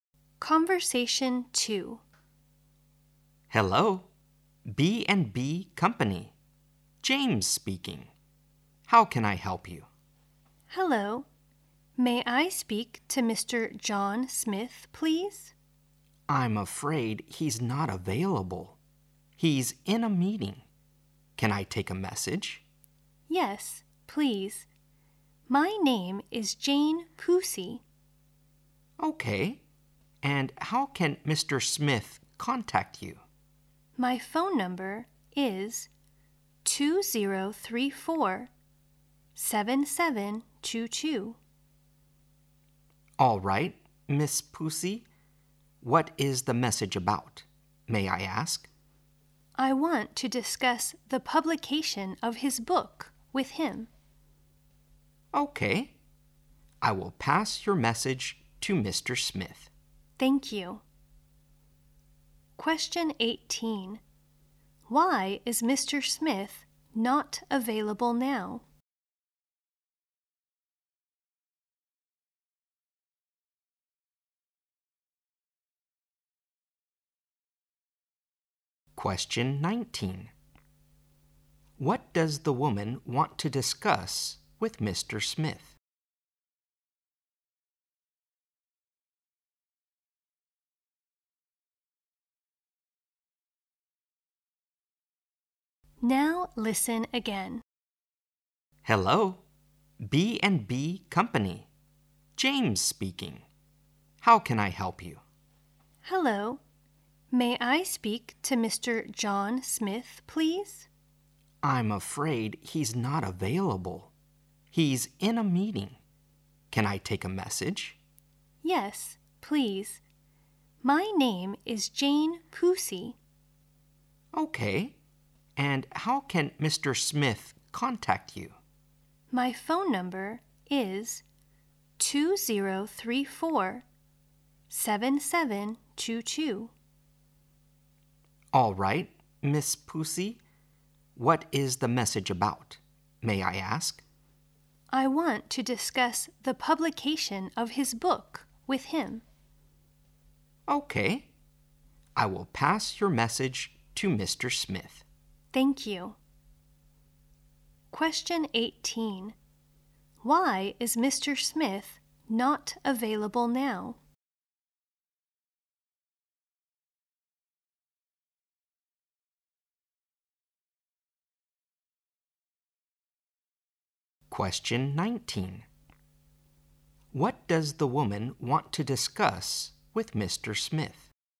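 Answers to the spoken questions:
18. He is in a meeting.
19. The publication of his book.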